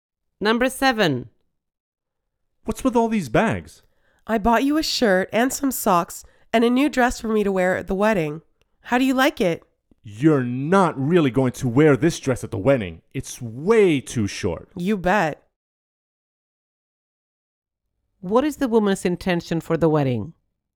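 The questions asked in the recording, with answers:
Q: What is the woman's intention for the wedding?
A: She intends to wear the short dress.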